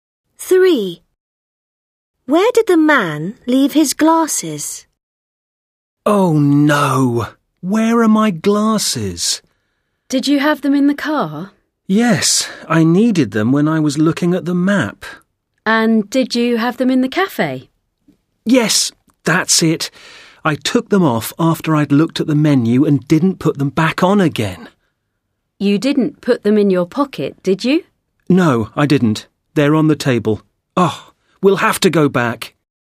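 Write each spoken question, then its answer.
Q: Where did the man leave his glasses?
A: On the table in the cafe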